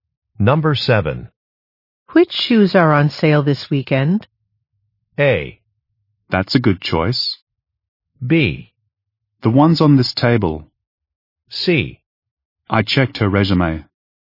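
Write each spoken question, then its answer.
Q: Which shoes are on sale this weekend?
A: B: The ones on this table.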